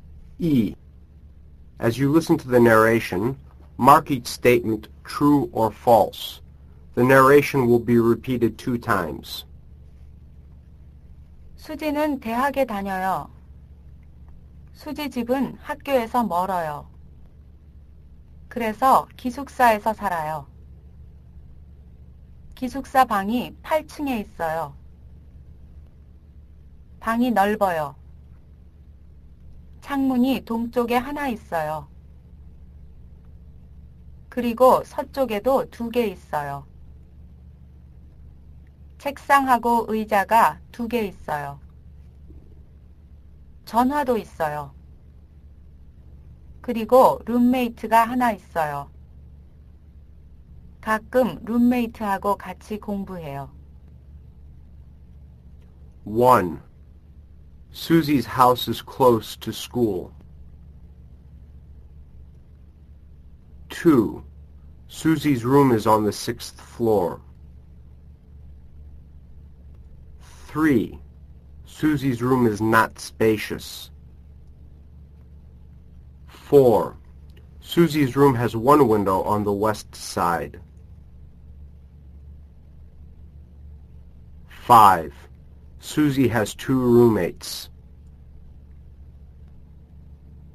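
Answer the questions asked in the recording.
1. False
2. False
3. False
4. False
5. False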